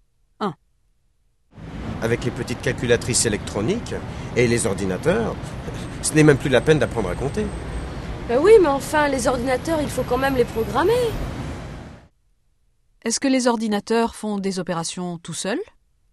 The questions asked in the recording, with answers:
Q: Est-ce que les ordinateurs font des opérations tout seuls?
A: Non, il faut les programmer.